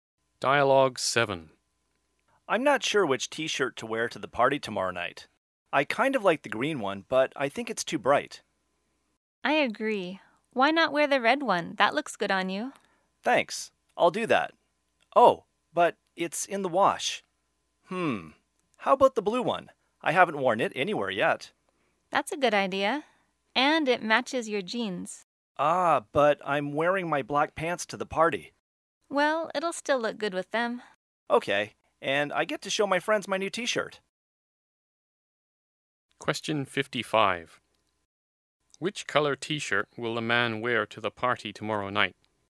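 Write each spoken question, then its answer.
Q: Which color t-shirt will the man wear to the party tomorrow night?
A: Blue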